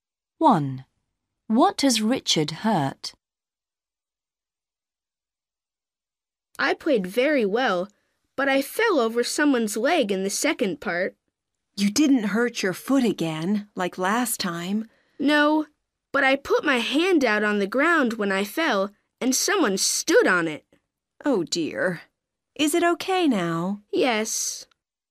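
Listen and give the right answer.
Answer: his hand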